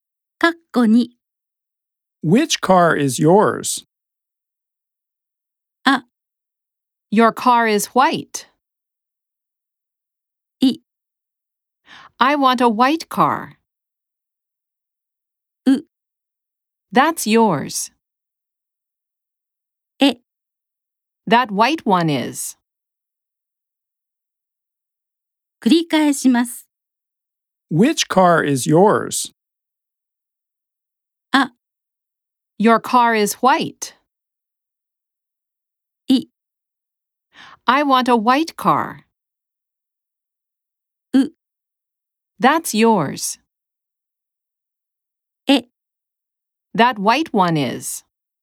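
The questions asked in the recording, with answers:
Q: Which car is yours?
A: E: That white one is.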